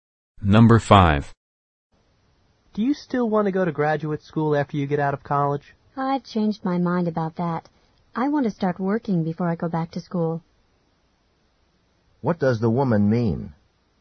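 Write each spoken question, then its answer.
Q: What does the woman mean?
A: She wants to work before going to graduate school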